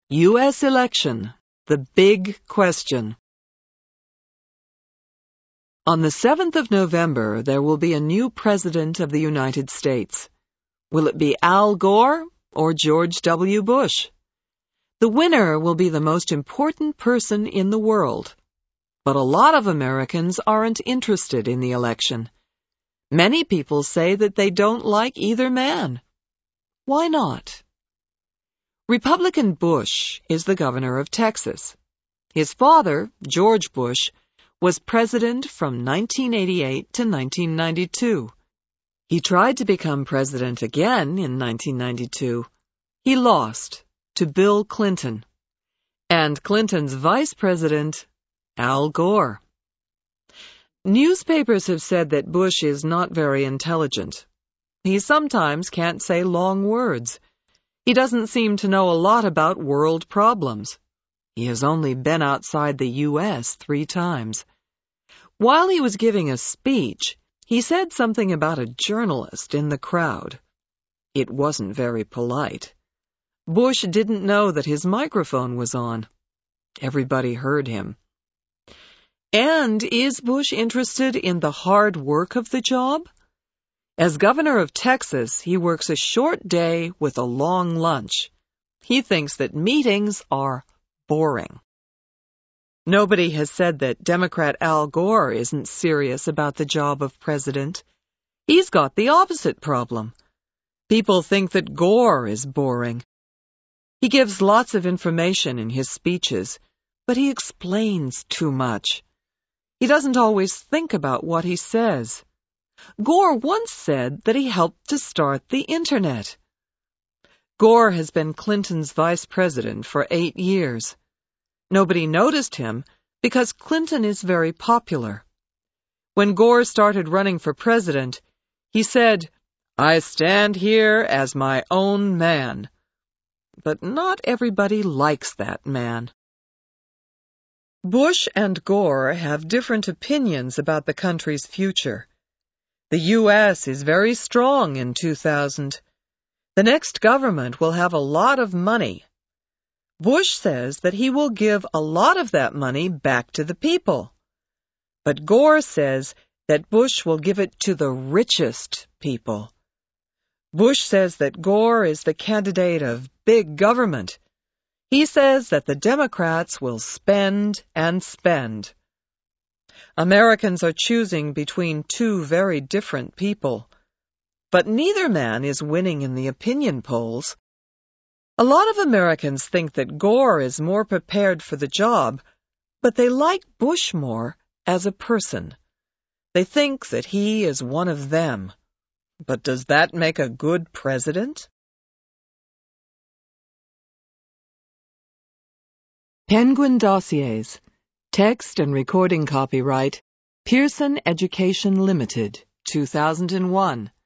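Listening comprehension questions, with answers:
Answer these questions TRUE or FALSE:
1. Americans are excited about the race.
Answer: FALSE

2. Al Gore has been President.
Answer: FALSE

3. George W. Bush's father was a politician.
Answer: TRUE

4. Bill Clinton won against the older George Bush.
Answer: TRUE

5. Bush does not work a long day in Texas.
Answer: TRUE

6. Newspapers say that Gore is not intelligent.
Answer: FALSE

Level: Intermediate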